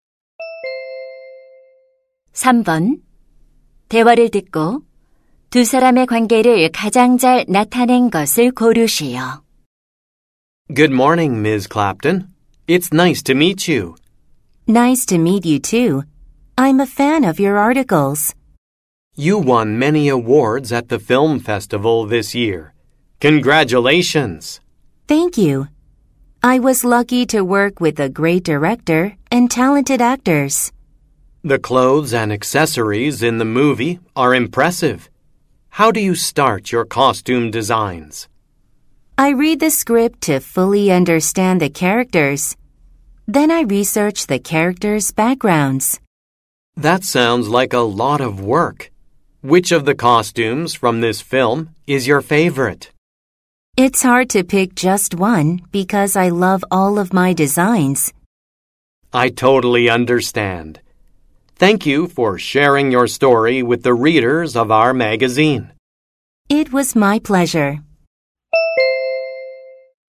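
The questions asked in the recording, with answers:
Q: 대화를 듣고 두 사람의 관계를 가장 잘 나타낸 것을 고르시오.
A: 잡지 기자 — 의상 디자이너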